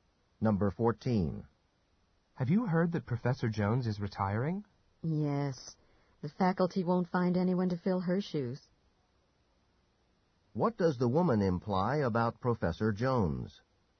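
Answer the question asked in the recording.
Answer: She will be very hard to replace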